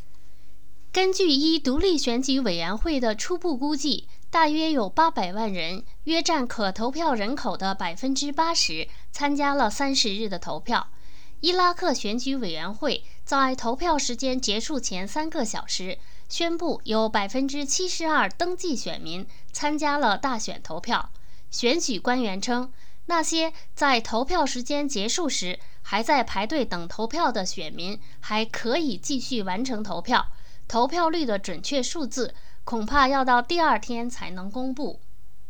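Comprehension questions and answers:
Please answer the following questions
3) 伊拉克选举委员会认为有多少选民参加了大选?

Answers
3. 72%的登记选民

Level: 3rd Year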